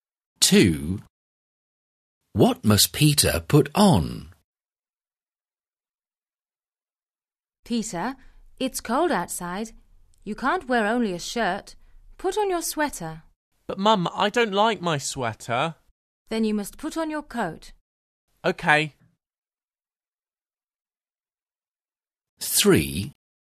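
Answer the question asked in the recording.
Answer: His coat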